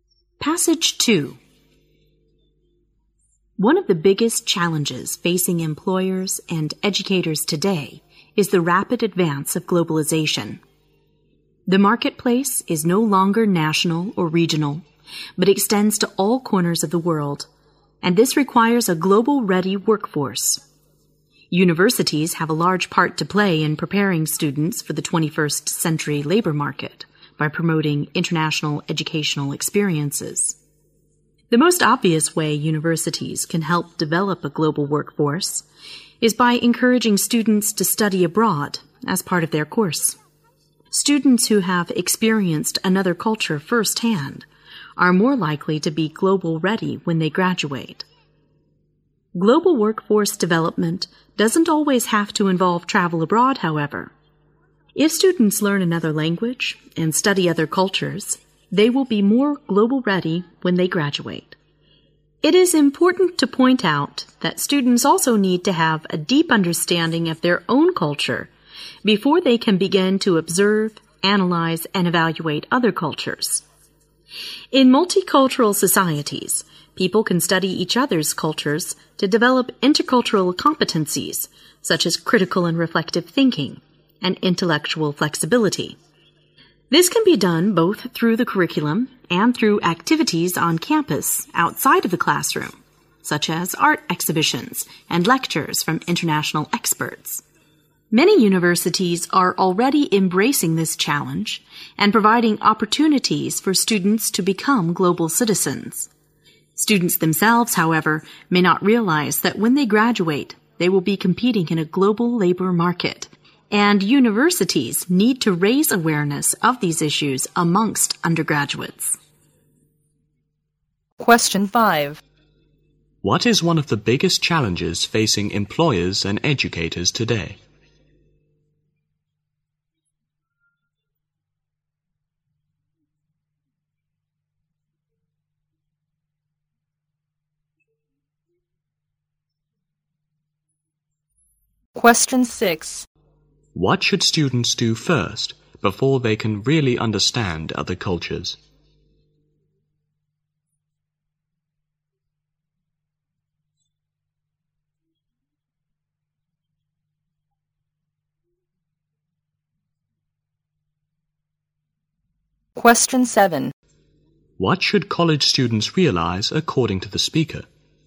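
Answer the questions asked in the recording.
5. The rapid advance of globalization.
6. Understand their own culture deeply.
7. That they will compete in a global labor market when they graduate.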